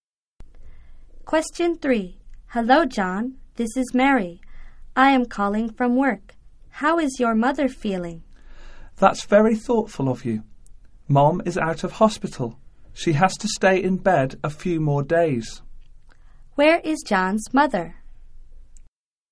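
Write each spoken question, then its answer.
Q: Where is John's mother?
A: At home, in bed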